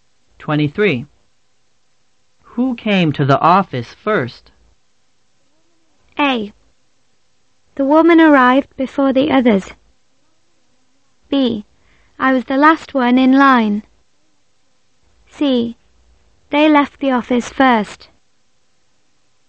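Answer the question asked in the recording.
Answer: A: The woman arrived before the others.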